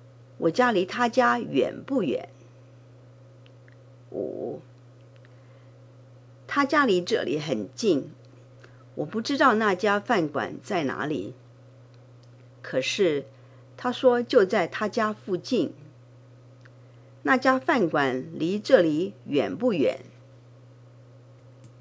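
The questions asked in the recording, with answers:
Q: 那家饭馆离这里远不远?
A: 不远,很近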